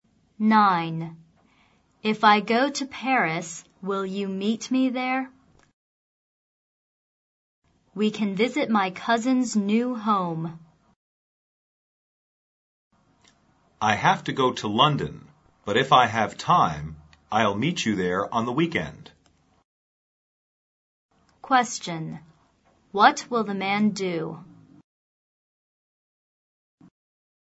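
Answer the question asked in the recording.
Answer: Go to London and meet her in Paris on the weekend if he has time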